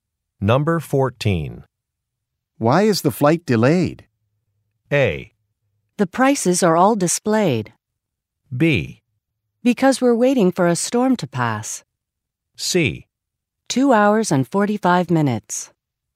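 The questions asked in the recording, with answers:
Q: Why is the flight delayed?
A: B: Because we're waiting for a storm to pass.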